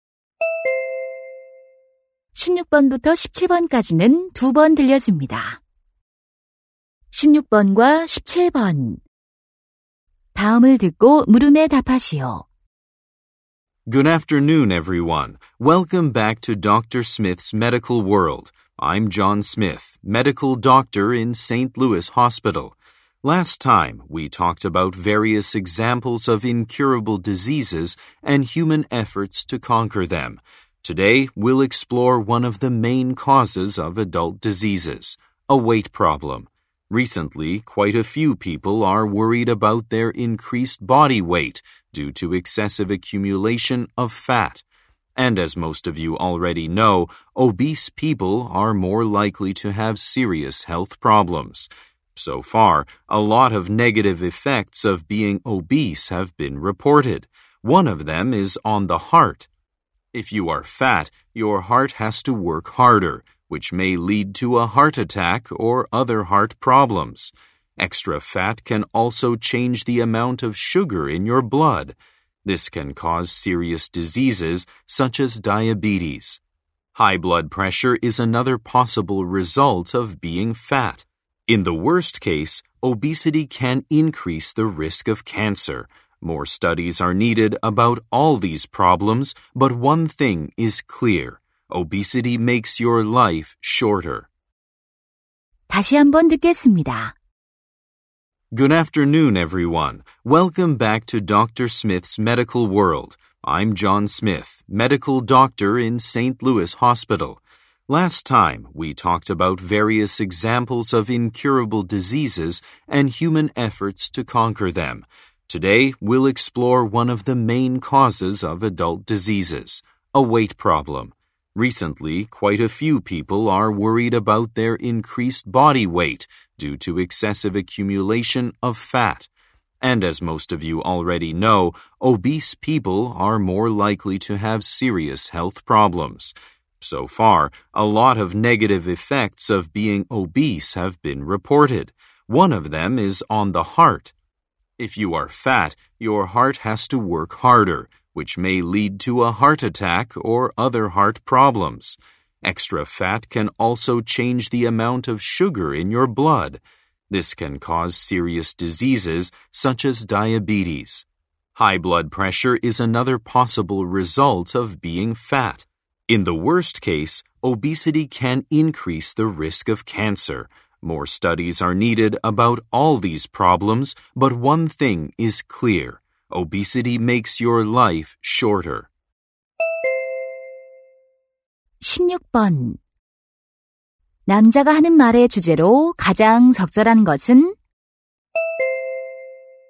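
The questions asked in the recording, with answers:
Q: 남자가 하는 말의 주제로 가장 적절한 것은?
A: 비만이 건강에 미치는 악영향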